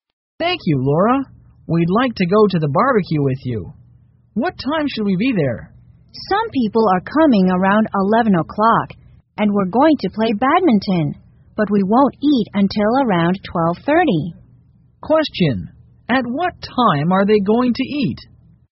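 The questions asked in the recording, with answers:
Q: Question, at what time are they going to eat?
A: around 12:30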